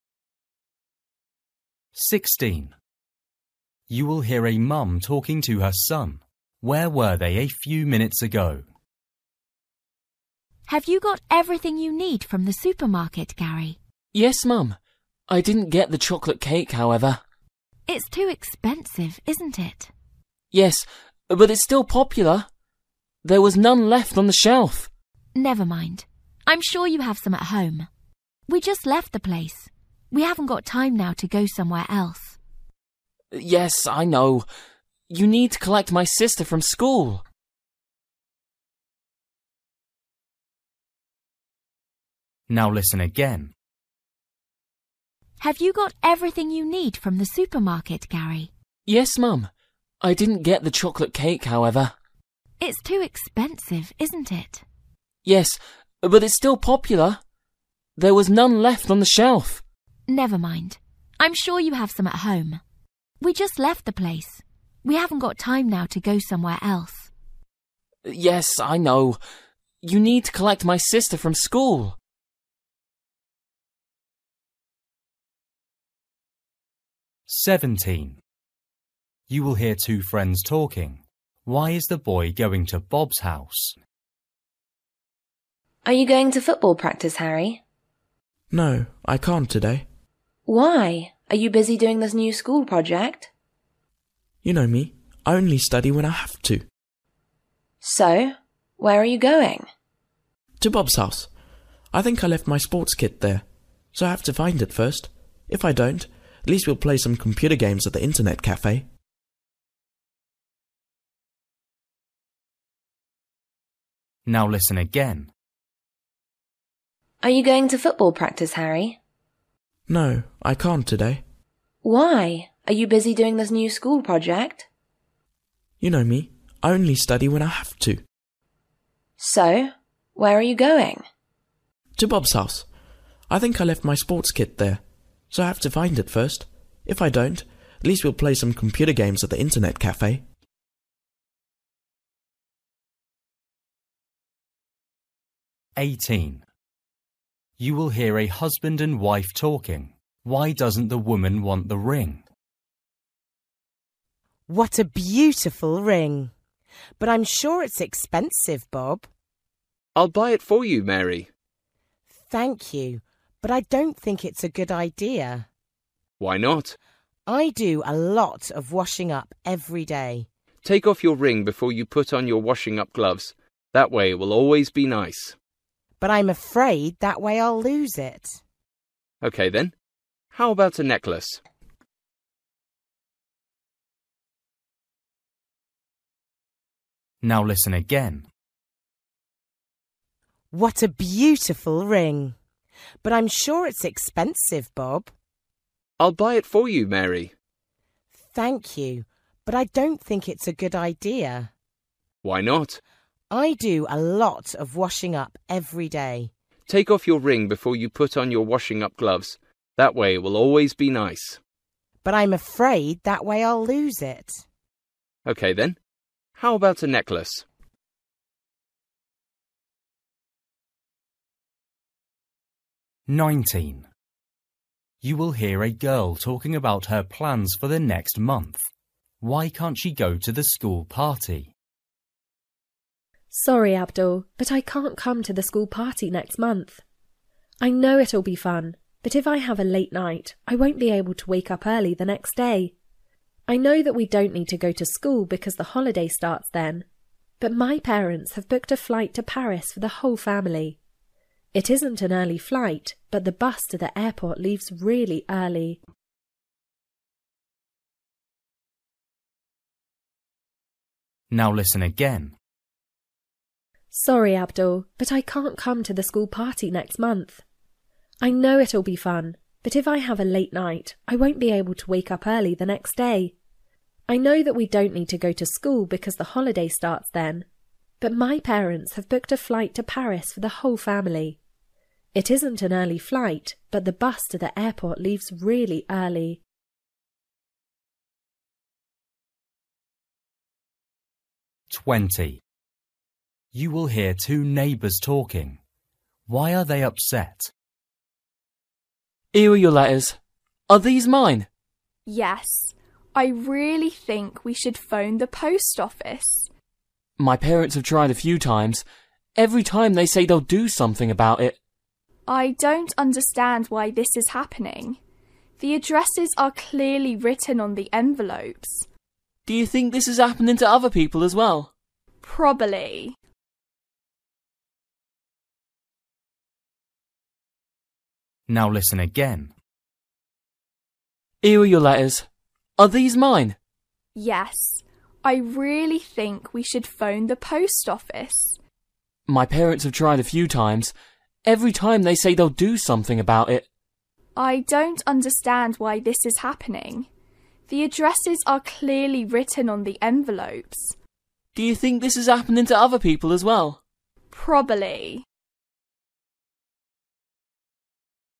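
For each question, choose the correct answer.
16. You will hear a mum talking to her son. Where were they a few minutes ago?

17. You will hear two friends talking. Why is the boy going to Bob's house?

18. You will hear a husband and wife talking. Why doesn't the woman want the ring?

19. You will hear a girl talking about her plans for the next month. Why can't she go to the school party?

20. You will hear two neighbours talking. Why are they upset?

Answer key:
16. At the supermarket
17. To find his sports kit
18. She is afraid she'll lose it when she takes it off to wash up
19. She has to catch an early bus to the airport the next day
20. Their letters are being delivered to the wrong address

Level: Luyện nghe trình độ A2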